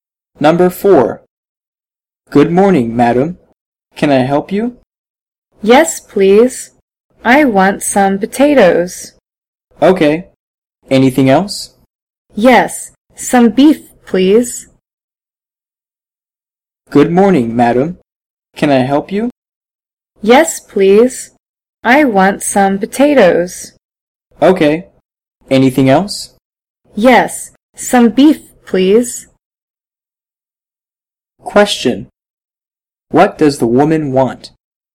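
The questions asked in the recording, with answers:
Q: What does the woman want?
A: Some potatoes and some beef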